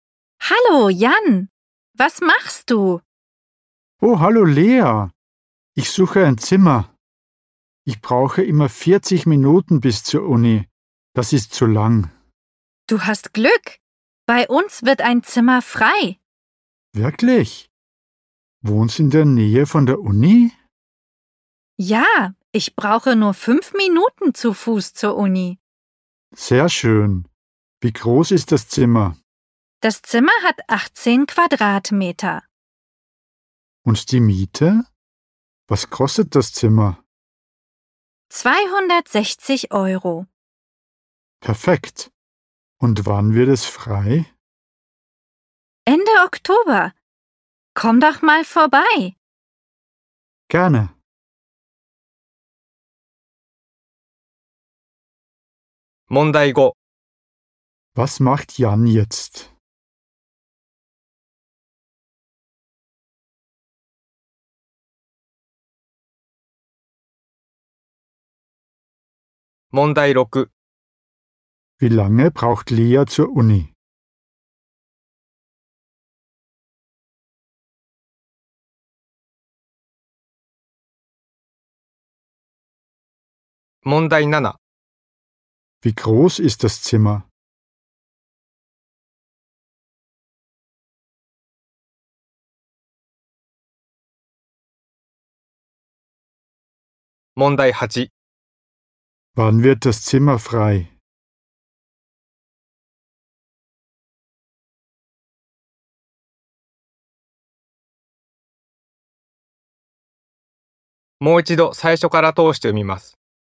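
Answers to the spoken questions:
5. Er sucht ein Zimmer.
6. 5 Minuten
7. 18 Quadratmeter
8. Ende Oktober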